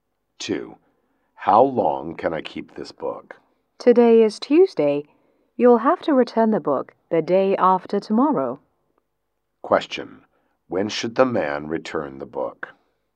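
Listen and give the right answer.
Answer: On Thursday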